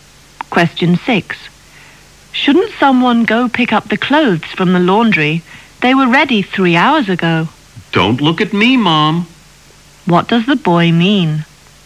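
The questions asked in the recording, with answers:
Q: What does the boy mean?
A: He doesn't want to go pick up the clothes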